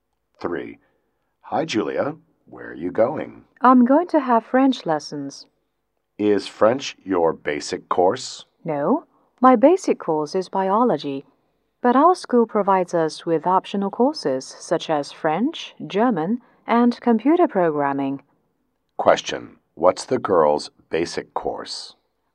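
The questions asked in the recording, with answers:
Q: what's the girl's basic course?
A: Biology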